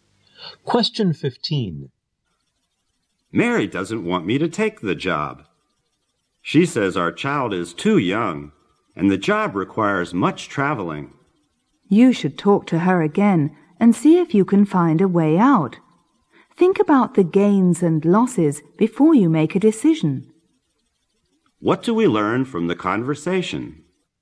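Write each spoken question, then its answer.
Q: What do we learn from the conversation?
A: Mary (his wife) doesn't want him to take the job because it needs much travel and their child is young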